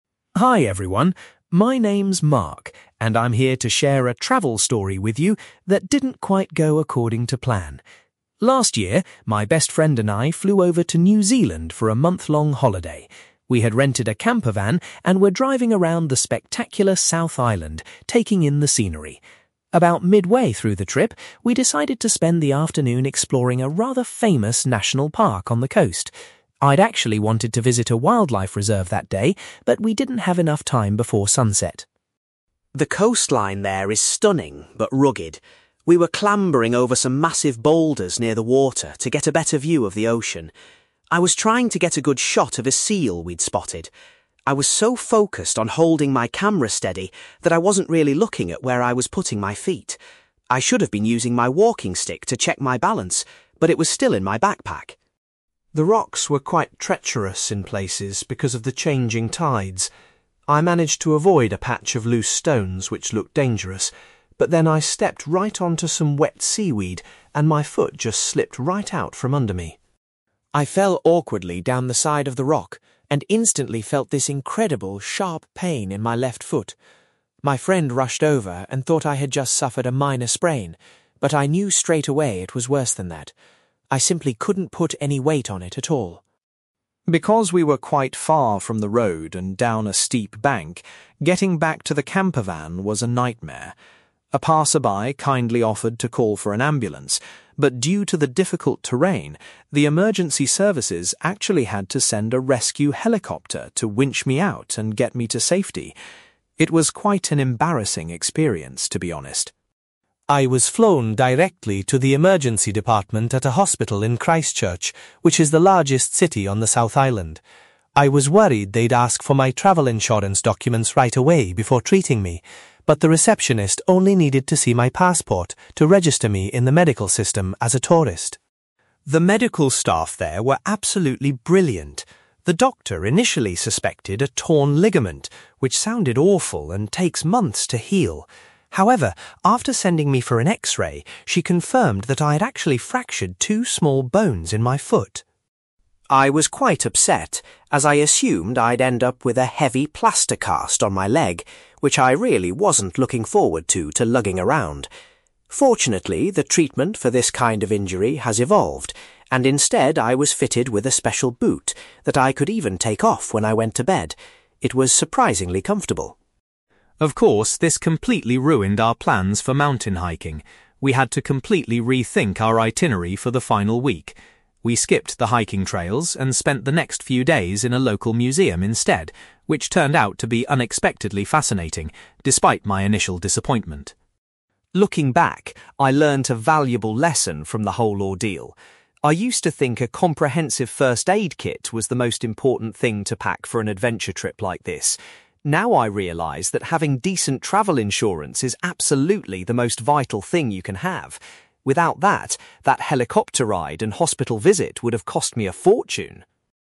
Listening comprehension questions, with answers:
You will hear a man called Mark talking about a trip to New Zealand where he injured his foot. For questions 9-18, complete the sentences with a word or short phrase.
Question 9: Mark and his friend spent an afternoon exploring a (9)........................... during their trip.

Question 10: Mark was trying to keep his (10)........................... still when he lost his footing.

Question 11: Mark says that stepping on some (11)........................... caused him to fall over.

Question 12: Immediately after falling, Mark experienced a (12)........................... in his foot.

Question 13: Mark was transported away from the boulders by a (13)........................... because the location was so remote.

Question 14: At the hospital in Christchurch, Mark had to show his (14)........................... to the receptionist.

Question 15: An (15)........................... revealed that Mark had broken two bones.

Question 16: Mark was relieved that he had to wear a (16)........................... rather than a traditional plaster cast.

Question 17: Because he couldn't go hiking, Mark spent time visiting a (17)........................... with his friend.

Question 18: Mark believes that taking out (18)........................... is the most essential preparation for a trip.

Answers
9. national park
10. camera
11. wet seaweed
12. sharp pain
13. rescue helicopter
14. passport
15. x-ray
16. special boot
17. museum
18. travel insurance

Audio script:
Mark: Hi everyone. My name is Mark, and I'm here to share a travel story with you that didn't quite go according to plan. Last year, my best friend and I flew over to New Zealand for a month-long holiday. We had rented a campervan and were driving around the spectacular South Island, taking in the scenery. About midway through the trip, we decided to spend the afternoon exploring a rather famous national park on the coast. I'd actually wanted to visit a wildlife reserve that day, but we didn't have enough time before sunset.
The coastline there is stunning, but rugged. We were clambering over some massive boulders near the water to get a better view of the ocean. I was trying to get a good shot of a seal we'd spotted. I was so focused on holding my camera steady that I wasn't really looking at where I was putting my feet. I should have been using my walking stick to check my balance, but it was still in my backpack!
The rocks were quite treacherous in places because of the changing tides. I managed to avoid a patch of loose stones which looked dangerous, but then I stepped right onto some wet seaweed and my foot just slipped right out from under me.
I fell awkwardly down the side of the rock and instantly felt this incredible, sharp pain in my left foot. My friend rushed over and thought I had just suffered a minor sprain, but I knew straight away it was worse than that. I simply couldn't put any weight on it at all.
Because we were quite far from the road and down a steep bank, getting back to the campervan was a nightmare. A passer-by kindly offered to call for an ambulance, but due to the difficult terrain, the emergency services actually had to send a rescue helicopter to winch me out and get me to safety. It was quite an embarrassing experience, to be honest!
I was flown directly to the emergency department at a hospital in Christchurch, which is the largest city on the South Island. I was worried they'd ask for my travel insurance documents right away before treating me, but the receptionist only needed to see my passport to register me in the medical system as a tourist.
The medical staff there were absolutely brilliant. The doctor initially suspected a torn ligament, which sounded awful and takes months to heal. However, after sending me for an x-ray, she confirmed that I had actually fractured two small bones in my foot.
I was quite upset, as I assumed I'd end up with a heavy plaster cast on my leg, which I really wasn't looking forward to lugging around. Fortunately, the treatment for this kind of injury has evolved, and instead I was fitted with a special boot that I could even take off when I went to bed. It was surprisingly comfortable.
Of course, this completely ruined our plans for mountain hiking. We had to completely rethink our itinerary for the final week. We skipped the hiking trails and spent the next few days in a local museum instead, which turned out to be unexpectedly fascinating, despite my initial disappointment.
Looking back, I learned a valuable lesson from the whole ordeal. I used to think a comprehensive first aid kit was the most important thing to pack for an adventure trip like this. Now I realise that having decent travel insurance is absolutely the most vital thing you can have. Without it, that helicopter ride and hospital visit would have cost me a fortune!

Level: B2